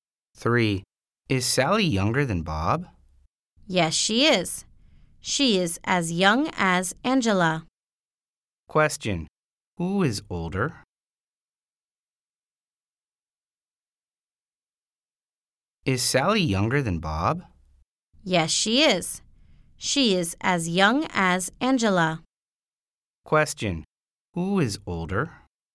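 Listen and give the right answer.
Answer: Bob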